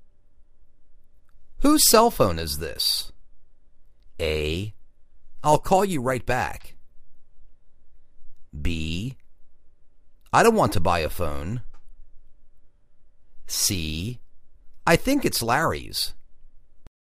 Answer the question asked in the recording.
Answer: I think it's Larry's